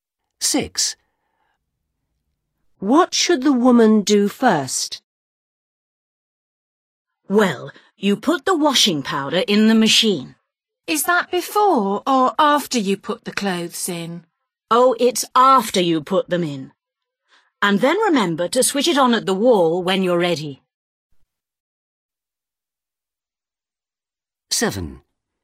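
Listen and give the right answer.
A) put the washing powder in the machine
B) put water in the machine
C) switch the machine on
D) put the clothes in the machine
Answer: D) put the clothes in the machine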